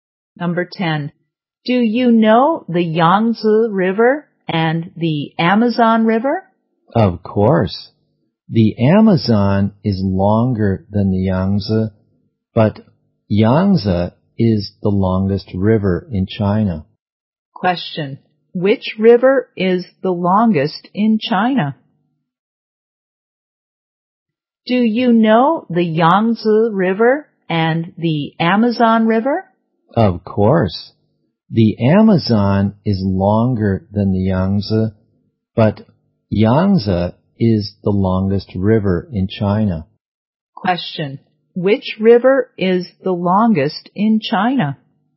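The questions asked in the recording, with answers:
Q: Which river is the longest in China?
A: The Yangtze River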